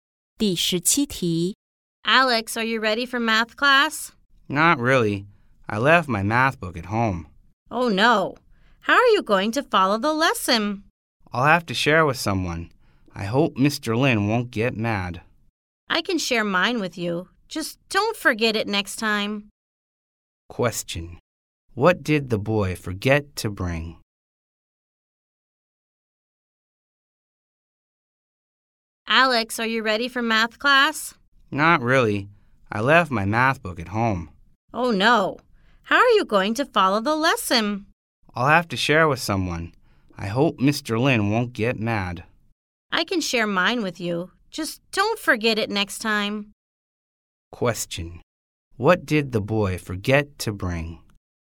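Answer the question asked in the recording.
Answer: His math book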